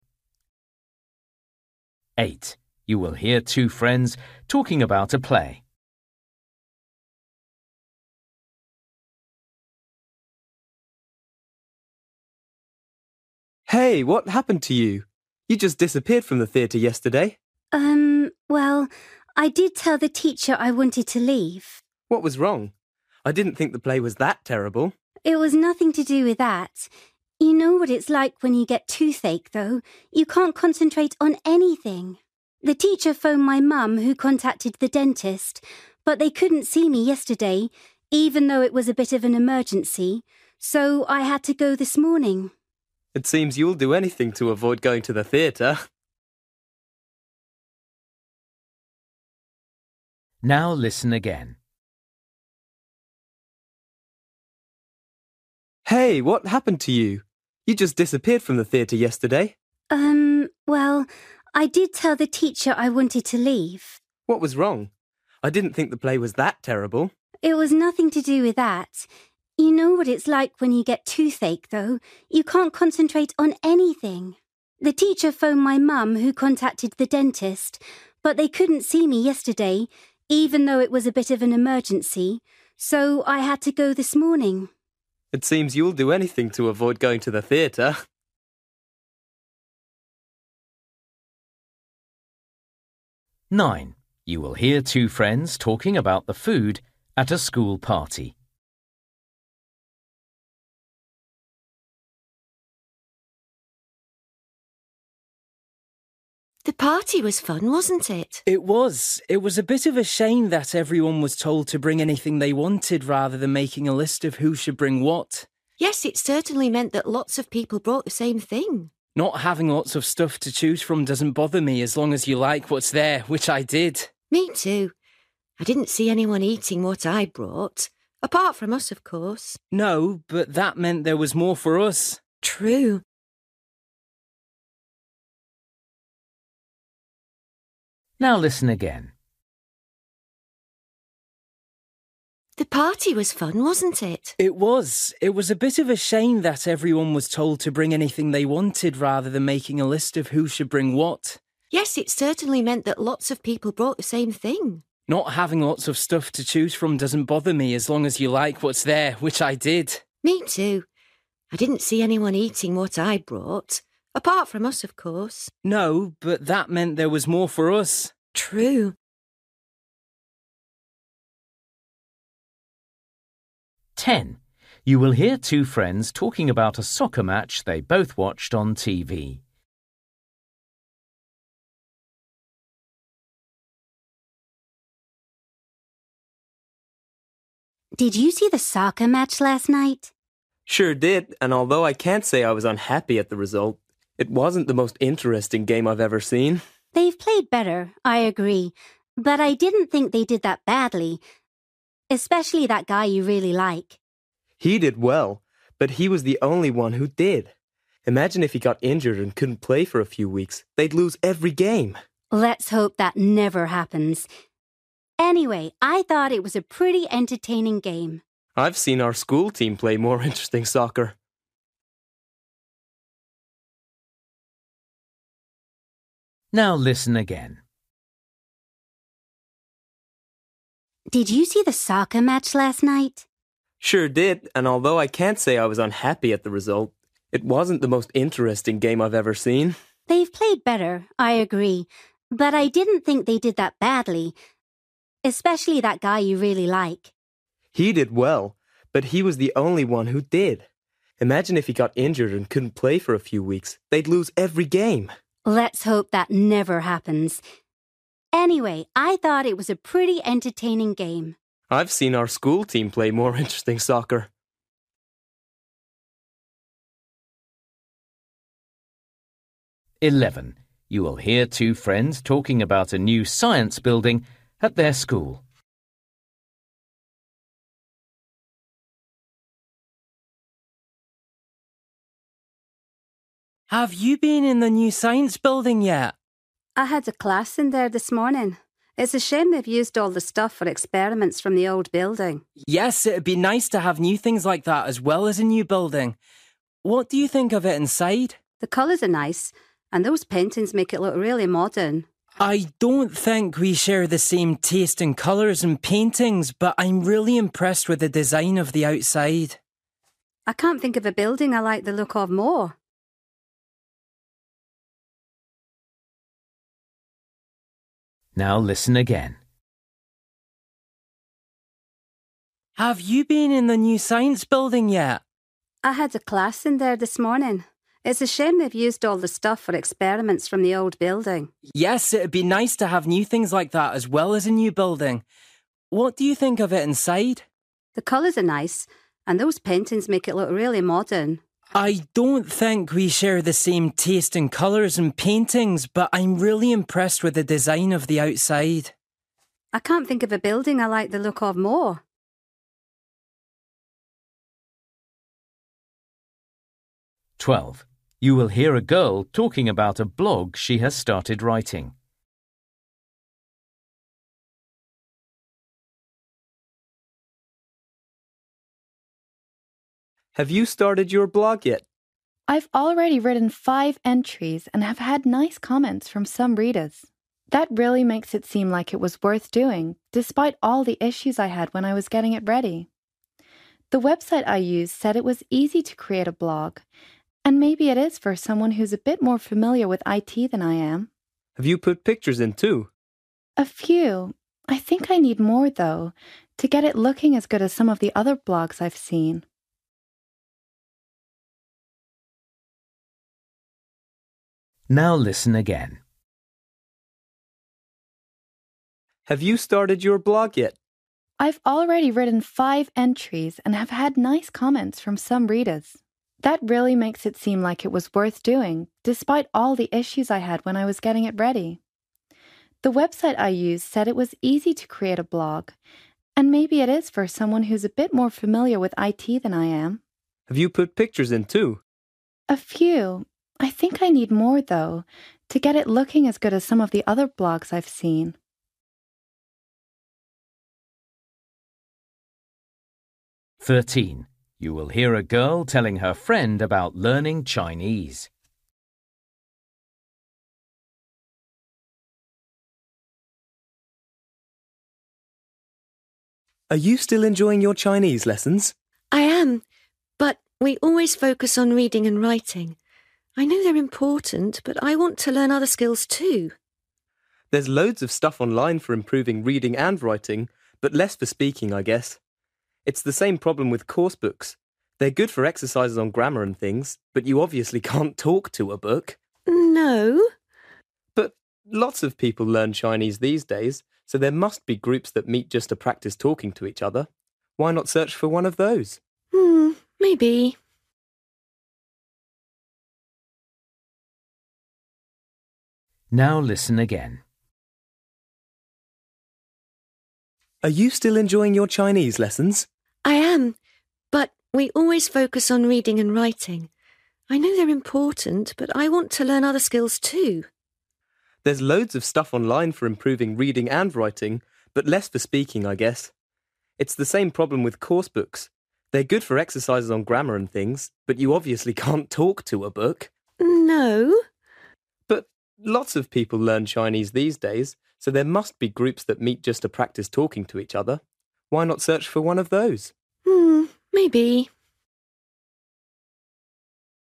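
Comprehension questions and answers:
For each question, choose the correct answer.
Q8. You will hear two friends talking about a play. Why did the girl leave the theatre early?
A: She had toothache.

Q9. You will hear two friends talking about the food at a school party. They agree that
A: they liked the food that was there, even though there wasn't much choice.

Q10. You will hear two friends talking about a soccer match they both watched on TV. Why was the boy disappointed?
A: The game wasn't very interesting.

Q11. You will hear two friends talking about a new science building at their school. They agree that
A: it's a shame the old equipment for experiments is still used.

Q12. You will hear a girl talking about a blog she has started writing. How does she feel about it?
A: She feels it was worth doing despite problems setting it up.

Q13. You will hear a girl telling her friend about learning Chinese. 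The boy suggests that the girl should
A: search for a group that meets to practise speaking.

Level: Luyện nghe trình độ B1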